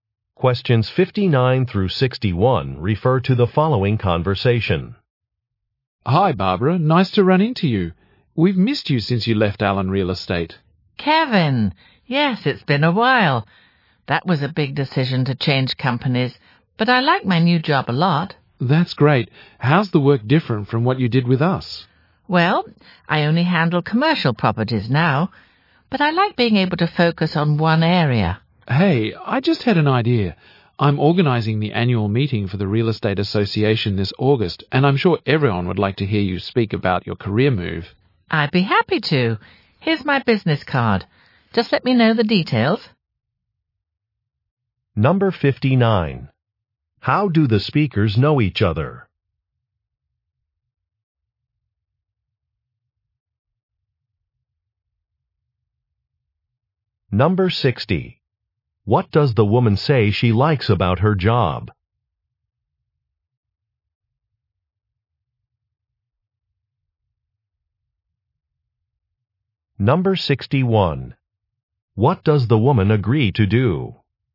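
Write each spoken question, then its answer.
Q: How do the speakers know each other?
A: They used to work together at Allen Real Estate

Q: What does the woman say she likes about her job?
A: Being able to focus on one area

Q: What does the woman agree to do?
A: Speak at the association's annual meeting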